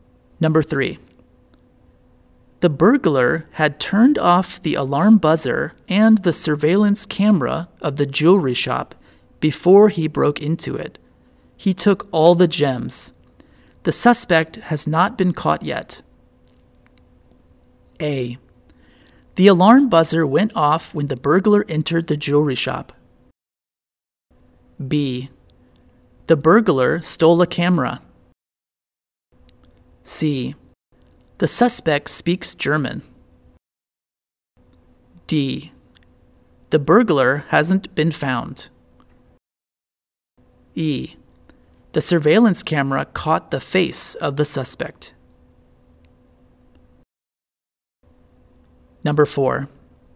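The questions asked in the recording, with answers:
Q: The burglar had turned off the alarm buzzer and the surveillance camera of the jewelry shop before he broke into it.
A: D: The burglar hasn't been found.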